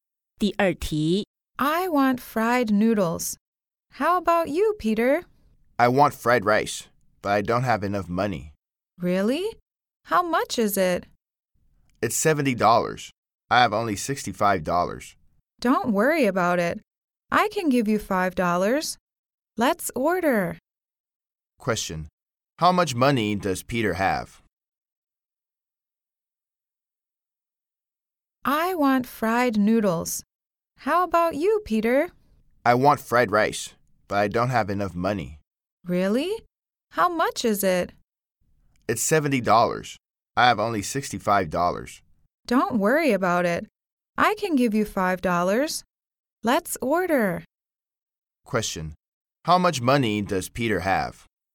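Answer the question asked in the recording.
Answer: $65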